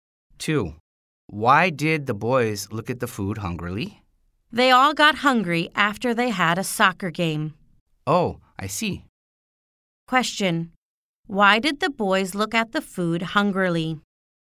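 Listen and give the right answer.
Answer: They got hungry after a soccer game.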